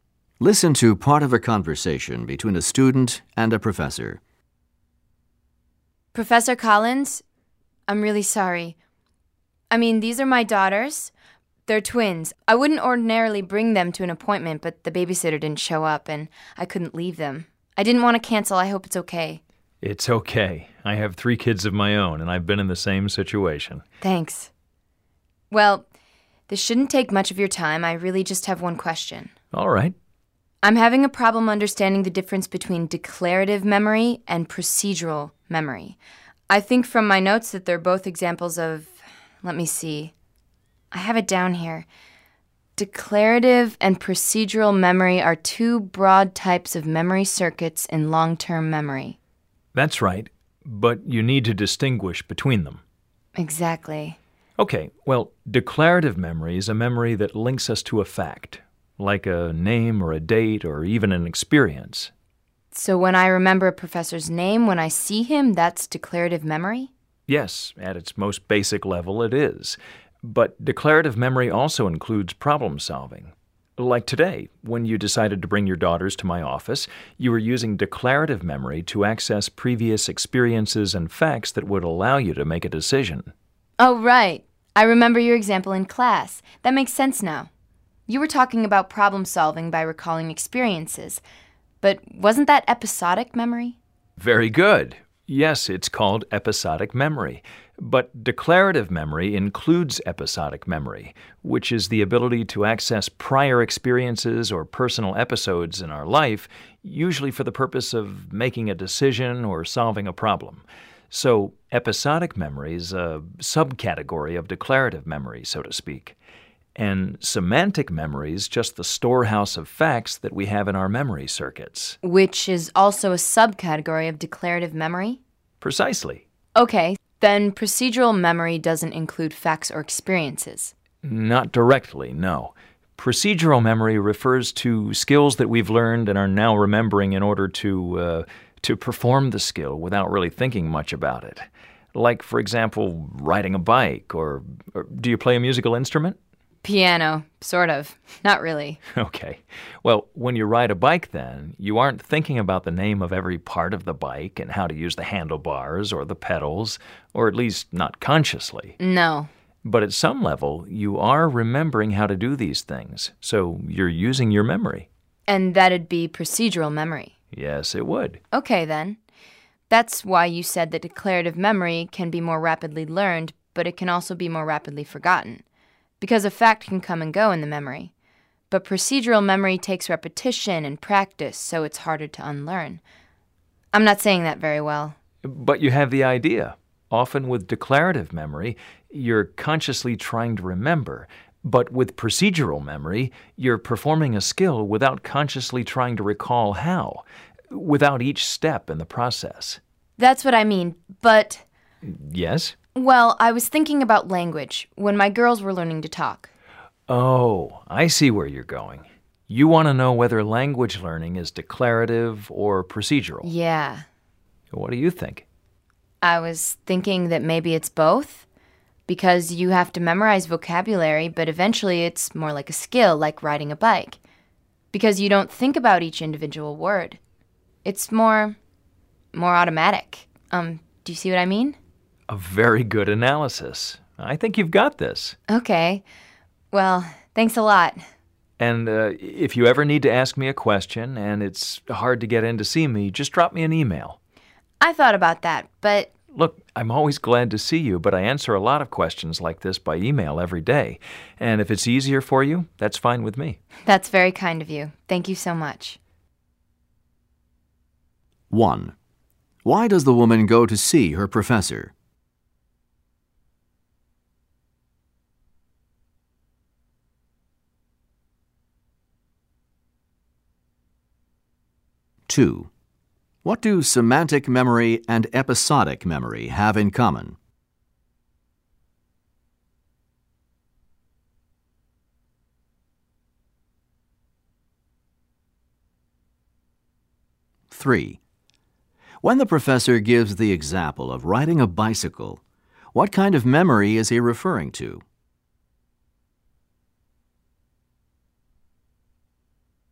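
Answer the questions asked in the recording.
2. Both are subcategories of declarative memory
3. Procedural memory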